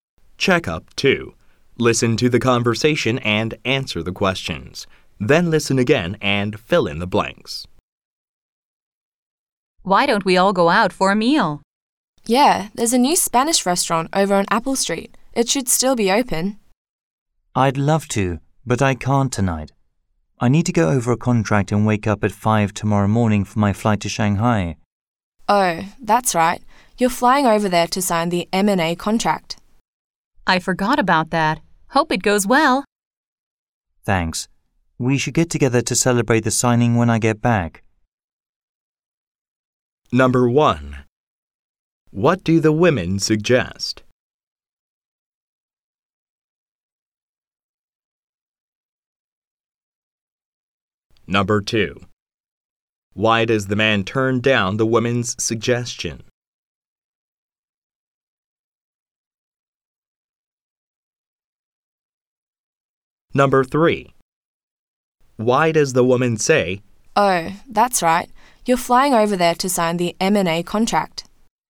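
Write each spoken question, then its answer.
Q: What do the women suggest?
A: Going out for a meal at a new Spanish restaurant

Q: Why does the man turn down the woman's suggestion?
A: He needs to go over a contract and catch an early flight to Shanghai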